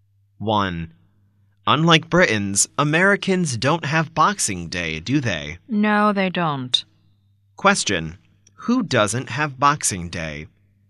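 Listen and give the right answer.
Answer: Americans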